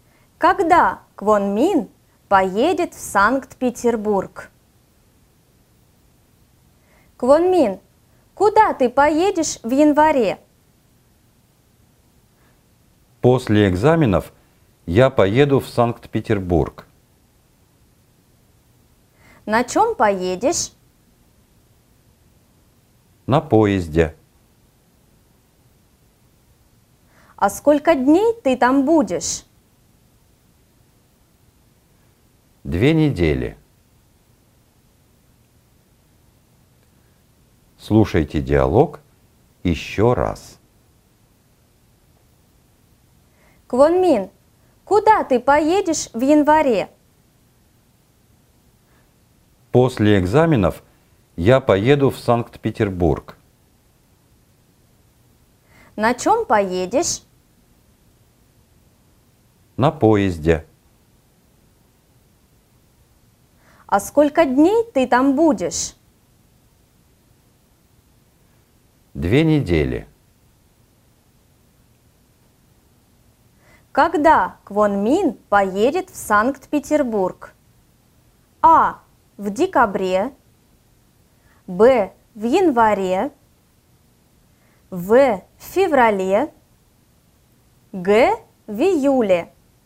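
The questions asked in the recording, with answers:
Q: Когда Квон Мин поедет в Санкт-Петербург?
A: Б: В январе.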